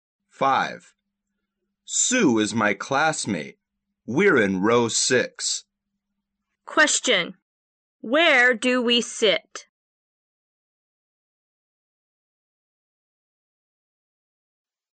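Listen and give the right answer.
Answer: In row 6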